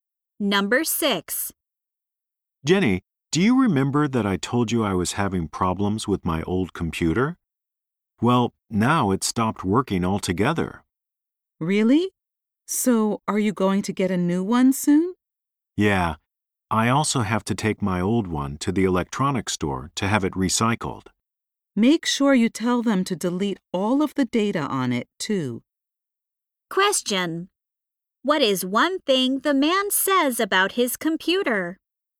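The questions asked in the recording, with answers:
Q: What is one thing the man says about his computer?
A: It stopped working altogether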